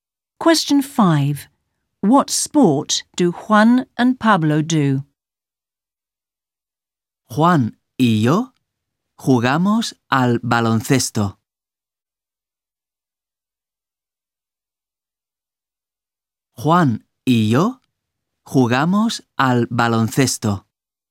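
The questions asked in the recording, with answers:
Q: What sport do Juan and Pablo do?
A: Basketball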